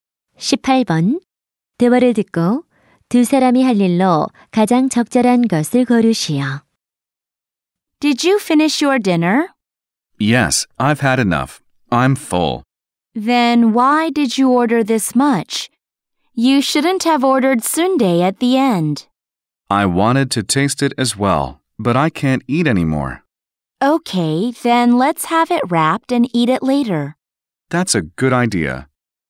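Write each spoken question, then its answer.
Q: 18번 대화를 듣고 두 사람이 할 일로 가장 적절한 것을 고르시오.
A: 남은 음식(선데)을 포장하기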